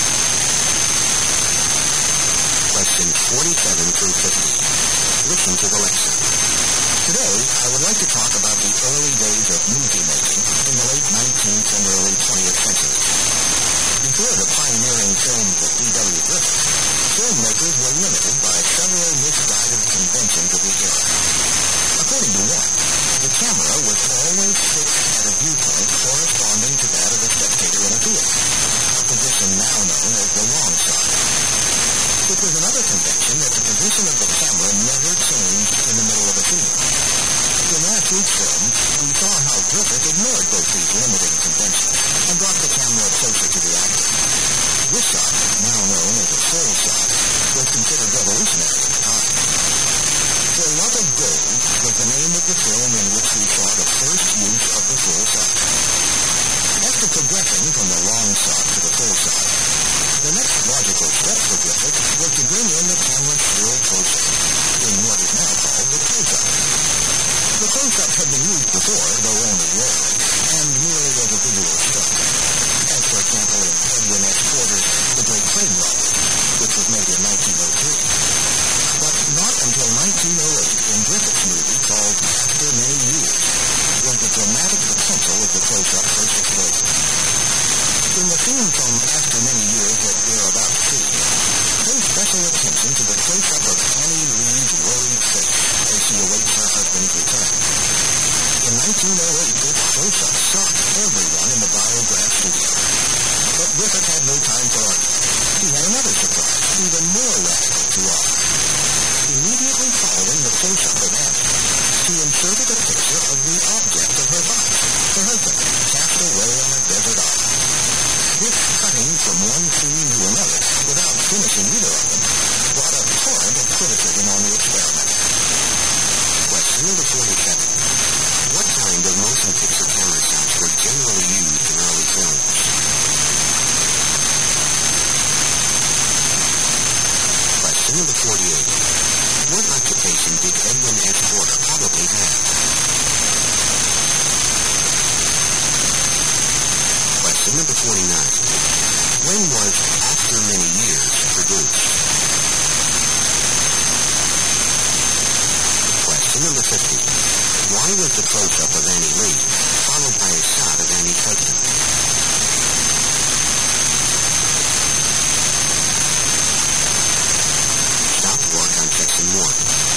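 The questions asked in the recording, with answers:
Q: What kind of motion picture camera shots were generally used in early films?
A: Long shots

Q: when was After Many Years produced?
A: 1908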